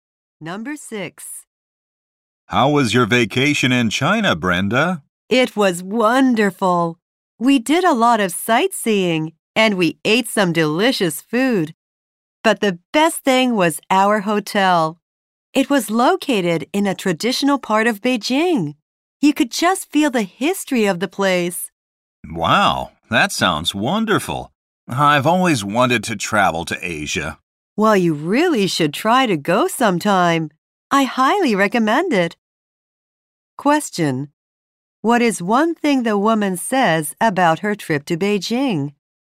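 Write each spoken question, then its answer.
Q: What is one thing the woman says about her trip to Beijing?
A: Her hotel was the best thing; it was in a traditional part of Beijing.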